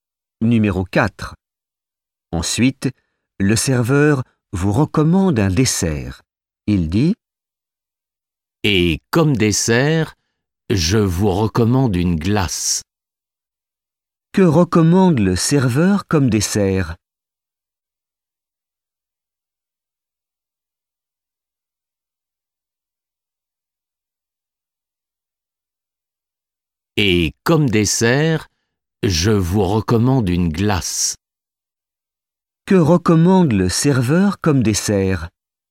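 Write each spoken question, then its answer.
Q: Que recommande le serveur comme dessert?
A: une glace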